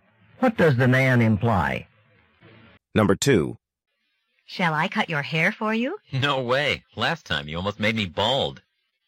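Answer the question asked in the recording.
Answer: He doesn't want the woman to cut his hair because she cut it too short last time.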